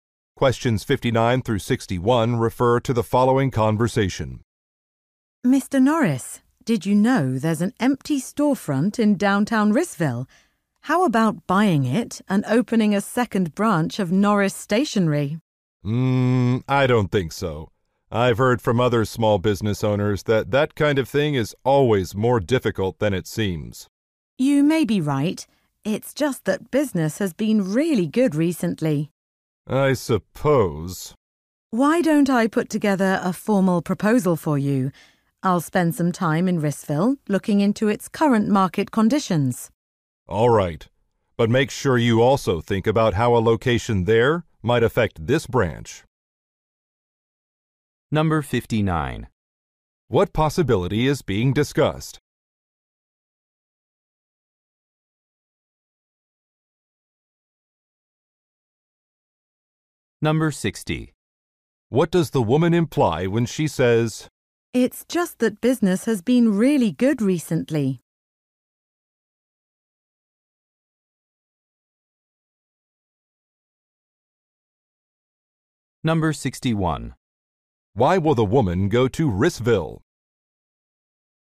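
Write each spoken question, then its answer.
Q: What possibility is being discussed?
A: Opening a second store branch

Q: Why will the woman go to Rissville?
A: To research market conditions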